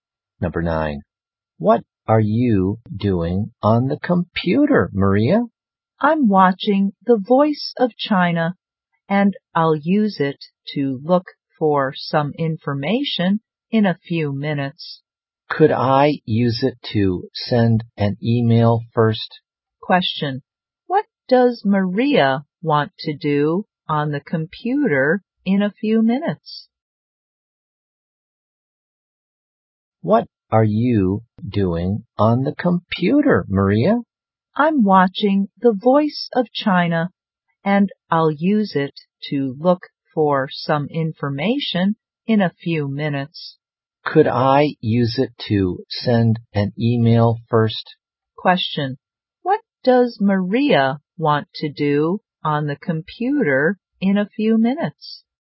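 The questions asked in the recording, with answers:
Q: Question, what does Maria want to do on the computer in a few minutes?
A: Look for some information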